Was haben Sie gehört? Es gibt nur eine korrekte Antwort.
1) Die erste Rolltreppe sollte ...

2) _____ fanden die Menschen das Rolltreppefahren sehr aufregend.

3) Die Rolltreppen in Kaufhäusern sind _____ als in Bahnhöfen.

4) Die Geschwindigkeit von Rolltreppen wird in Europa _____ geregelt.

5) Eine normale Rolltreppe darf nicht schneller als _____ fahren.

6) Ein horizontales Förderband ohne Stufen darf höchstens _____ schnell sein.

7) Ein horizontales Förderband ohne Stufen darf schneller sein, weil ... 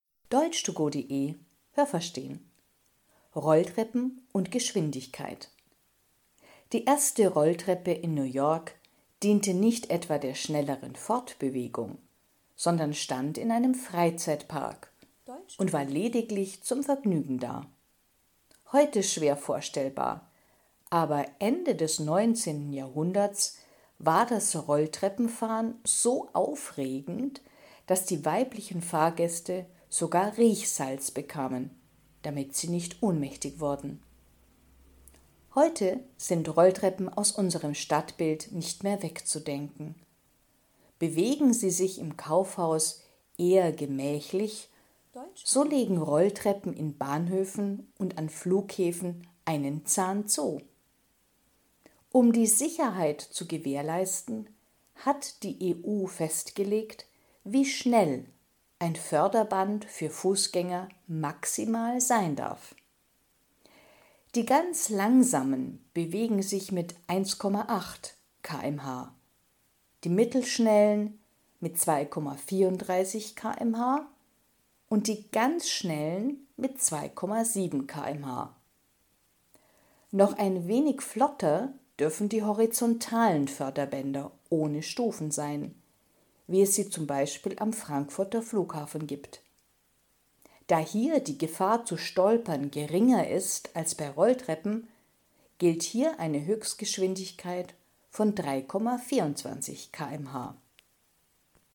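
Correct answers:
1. nur dem Vergnügen dienen (in einem Freizeitpark)
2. Ende des 19. Jahrhunderts
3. langsamer
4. von der EU
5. 2,7 km/h
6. 3,24 km/h
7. die Gefahr zu stolpern geringer ist

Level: B (mittel)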